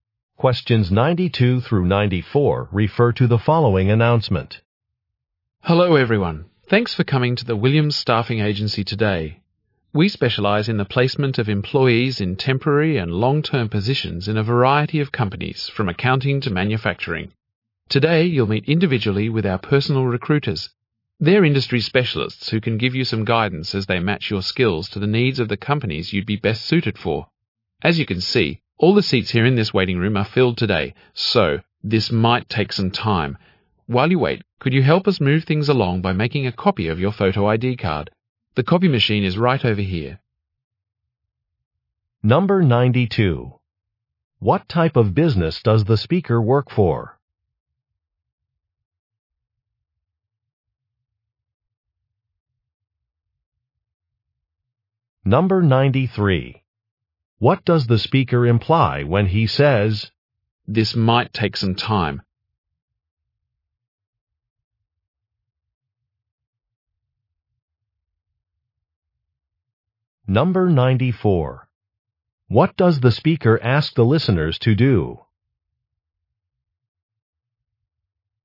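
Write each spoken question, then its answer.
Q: What type of business does the speaker work for?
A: A staffing agency

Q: "This might take some time"?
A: Listeners may have to wait a long time

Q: What does the speaker ask the listeners to do?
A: Copy their photo ID card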